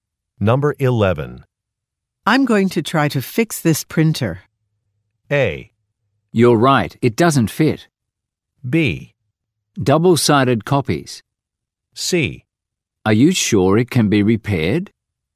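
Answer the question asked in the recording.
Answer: C: Are you sure it can be repaired?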